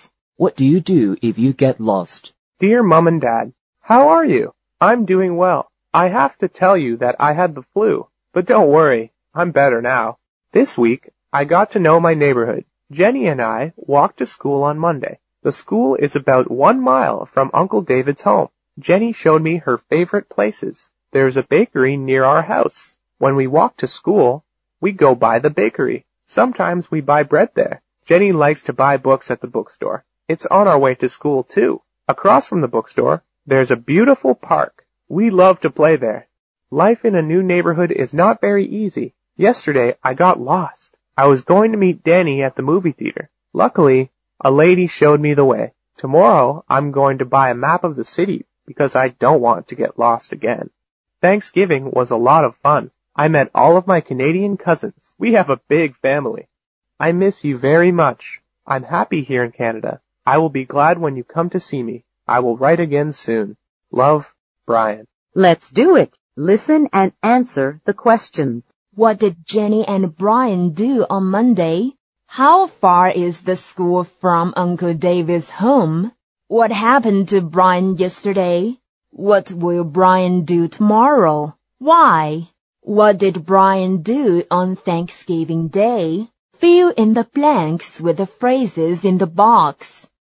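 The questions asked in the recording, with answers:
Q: What did Jenny and Brian do on Monday?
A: They walked to school.

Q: How far is the school from Uncle David's home?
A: About 1 mile.

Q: What happened to Brian yesterday?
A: He got lost.

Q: What will Brian do tomorrow?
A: He will buy a map of the city.

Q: What did Brian do on Thanksgiving Day?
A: He met all of his Canadian cousins.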